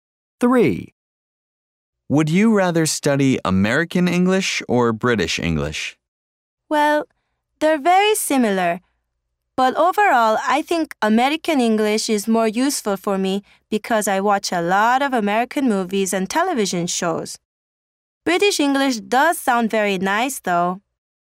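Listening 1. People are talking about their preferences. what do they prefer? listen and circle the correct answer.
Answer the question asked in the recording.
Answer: American English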